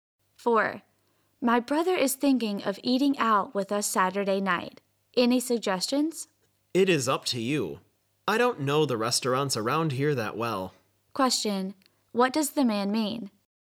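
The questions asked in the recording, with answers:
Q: What does the man mean?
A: The woman should choose the restaurant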